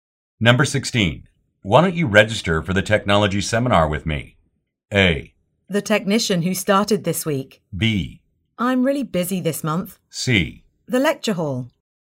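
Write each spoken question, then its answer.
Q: Why don't you register for the technology seminar with me?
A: B: I'm really busy this month.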